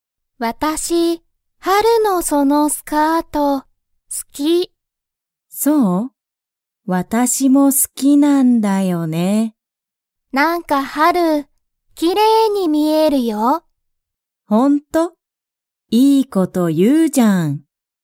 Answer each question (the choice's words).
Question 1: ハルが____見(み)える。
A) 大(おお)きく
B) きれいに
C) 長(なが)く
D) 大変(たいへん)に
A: きれいに

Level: Level 1